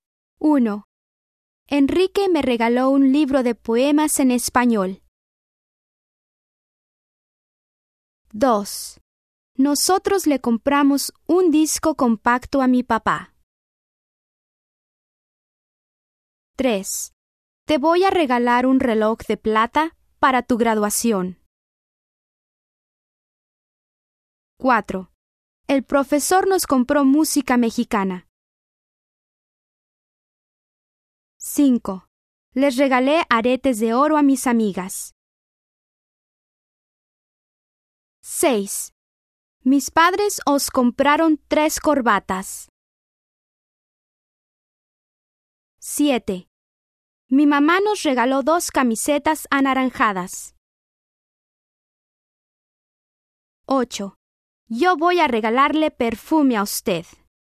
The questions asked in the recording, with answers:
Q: Enrique me regaló un libro de poemas en español.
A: 1. Yo.

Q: Nosotros le compramos un disco compacto a mi papá.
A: 2. Él.

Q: Te voy a regalar un reloj de plata para tu graduación.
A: 3. Tú.

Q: El profesor nos compró música mexicana.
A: 4. Nosotros.

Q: Les regalé aretes de oro a mis amigas.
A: 5. Ellas.

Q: Mis padres os compraron 3 corbatas.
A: 6. Vosotros.

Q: Mi mamá nos regaló 2 camisetas anaranjadas.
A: 7. Nosotros.

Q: Yo voy a regalarle perfume a usted.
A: 8. Usted.